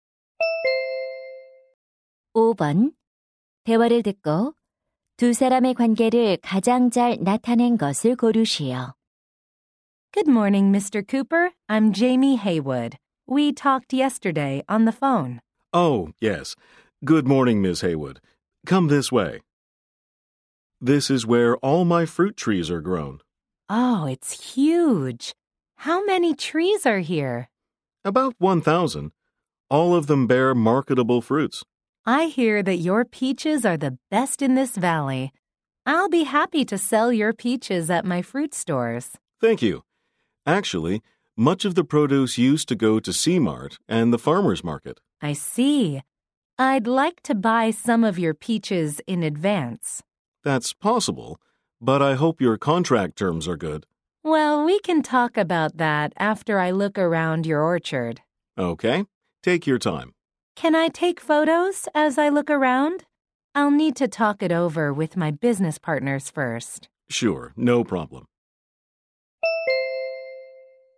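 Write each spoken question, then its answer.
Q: 대화를 듣고 두 사람의 관계를 가장 잘 나타낸 것을 고르시오.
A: 과일 가게 주인 - 과수원 주인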